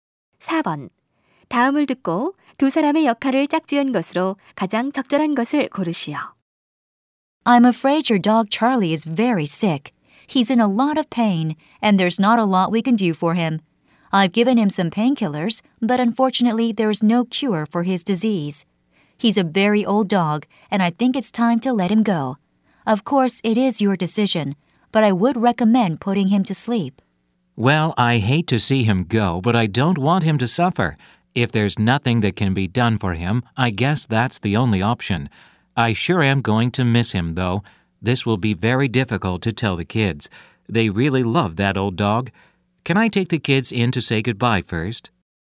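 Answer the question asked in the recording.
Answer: 수의사 - 개 주인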